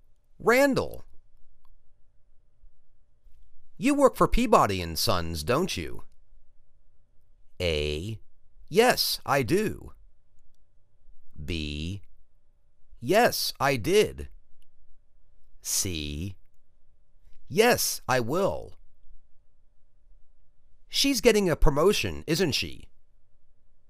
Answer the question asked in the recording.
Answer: Yes, I do.